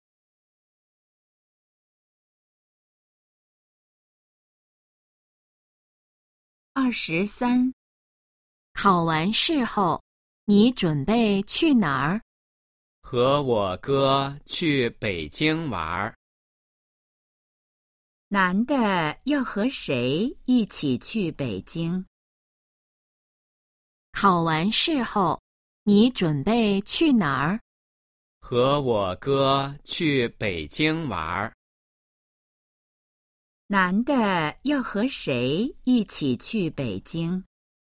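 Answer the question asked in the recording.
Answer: 他哥哥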